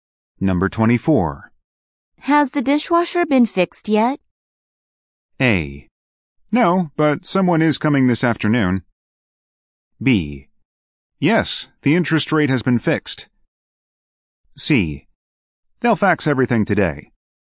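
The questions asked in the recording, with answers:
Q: Has the dishwasher been fixed yet?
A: A: No, but someone is coming this afternoon.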